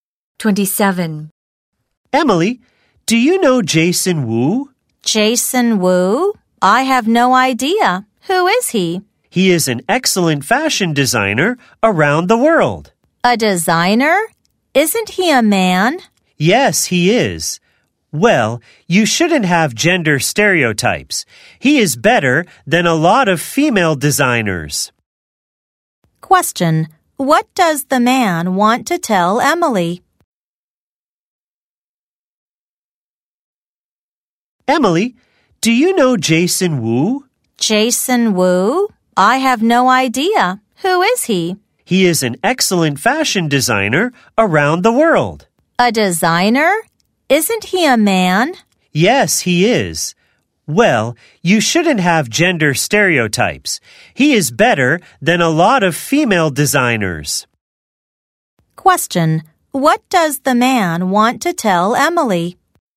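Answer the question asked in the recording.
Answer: She shouldn't have gender stereotypes.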